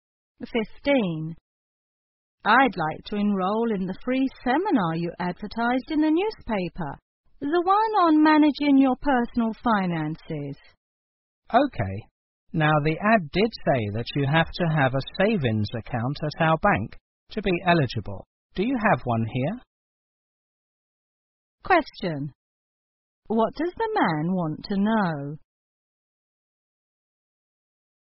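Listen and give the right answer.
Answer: Whether the woman has a savings account at the bank.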